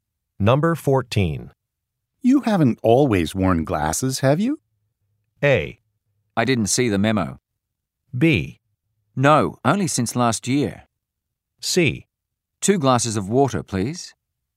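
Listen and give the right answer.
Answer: B: No, only since last year.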